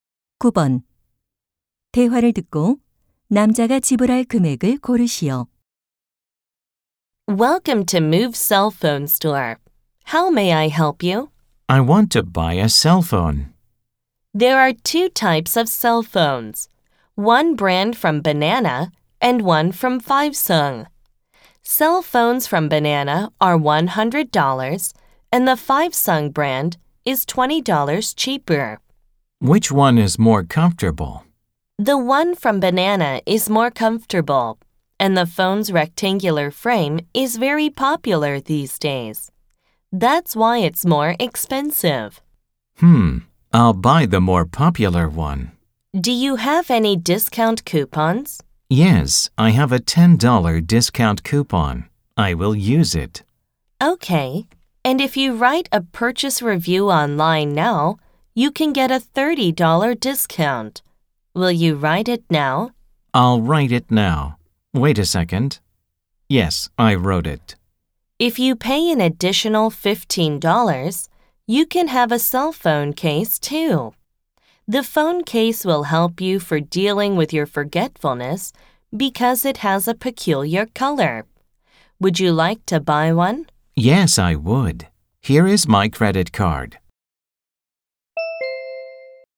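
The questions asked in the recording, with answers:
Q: 대화를 듣고 남자가 지불할 금액을 고르시오.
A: 75달러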